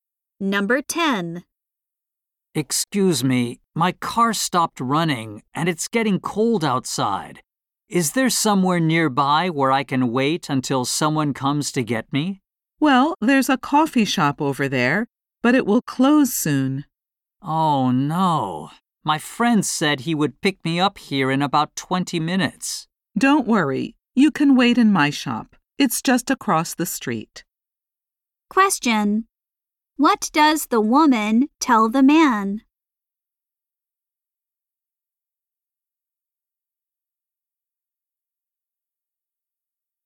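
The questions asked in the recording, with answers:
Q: What does the woman tell the man?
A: He can wait in her shop.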